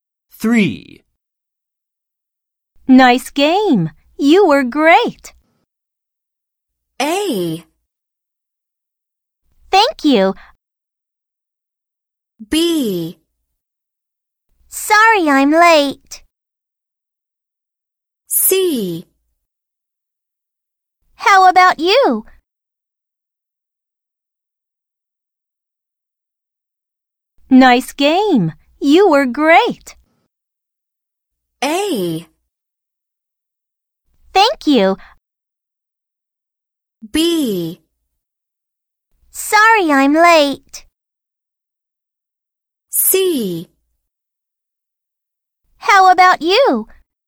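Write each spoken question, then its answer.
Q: Nice game. You were great.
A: A: Thank you.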